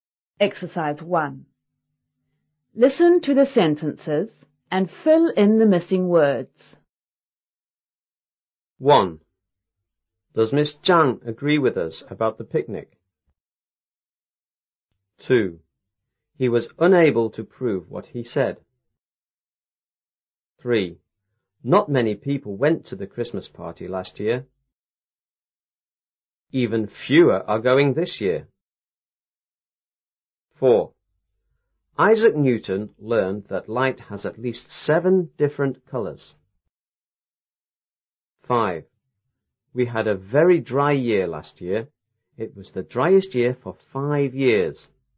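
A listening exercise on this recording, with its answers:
1.Listen to the sentences and fill in the missing words.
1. Does Miss Zhang __ with us about the picnic?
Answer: agree

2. He was unable to __ what he said.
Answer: prove

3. Even __ are going this year.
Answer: fewer

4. Isaac Newton learned that light has _ _ seven different colours.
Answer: at least

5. We had a very dry year last year.It was the __ year for five years.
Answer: driest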